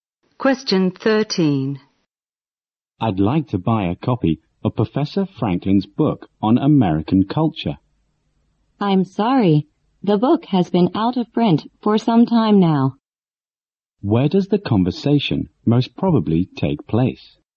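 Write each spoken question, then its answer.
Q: Where does the conversation most probably take place?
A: In a bookstore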